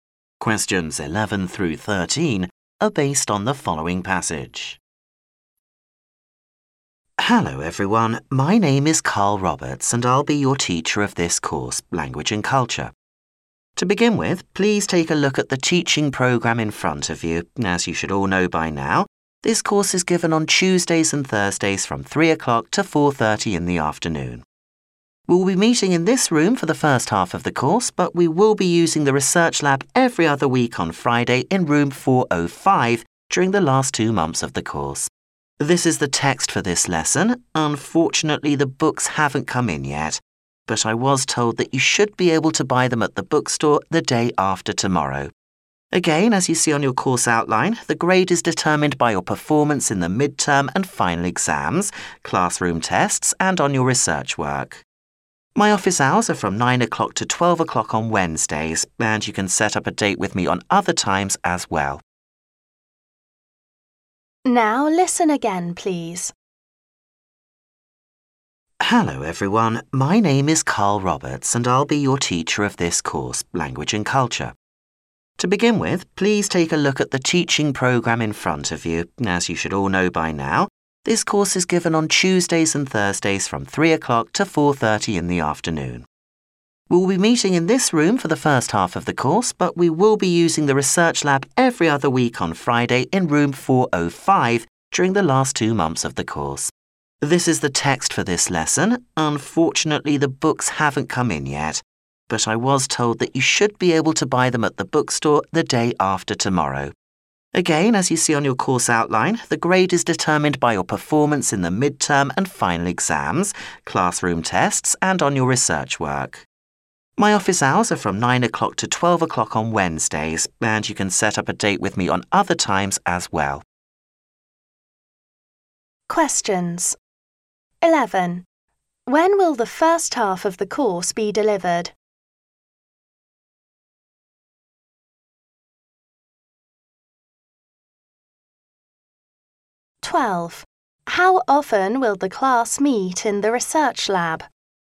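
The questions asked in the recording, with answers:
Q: How often will the class meet in the research lab?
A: Every other week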